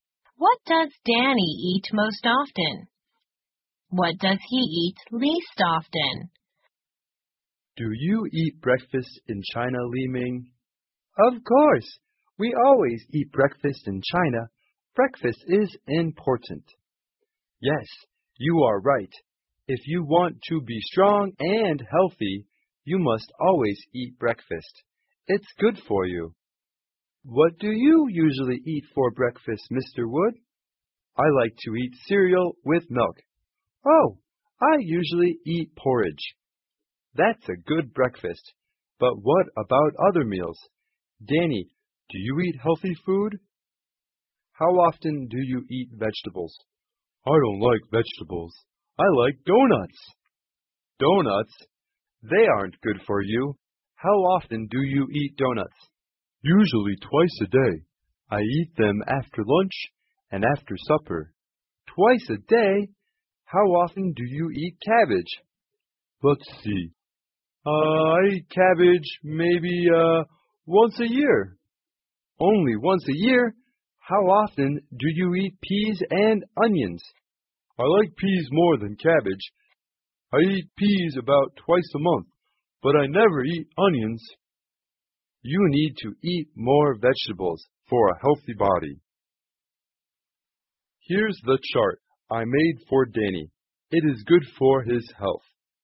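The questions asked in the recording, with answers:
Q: What does Danny eat most often?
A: Donuts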